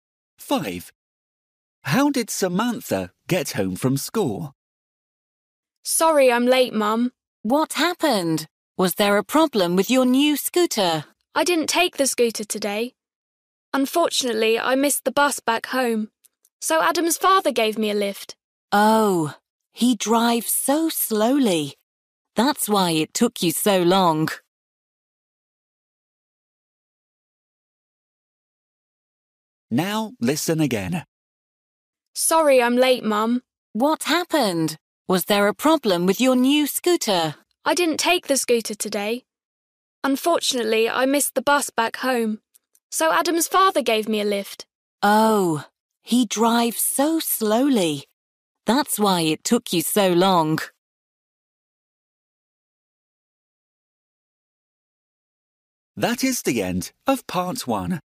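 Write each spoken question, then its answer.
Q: How did Samantha get home from school?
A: By car (Adam's father gave her a lift)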